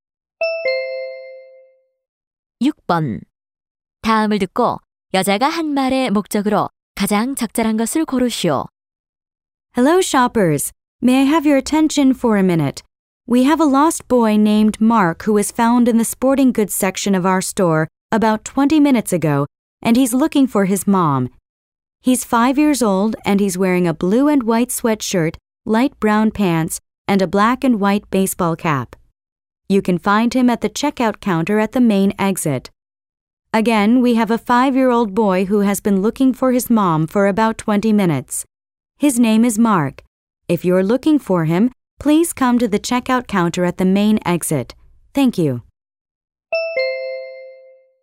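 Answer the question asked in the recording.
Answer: 미아의 엄마를 찾으려고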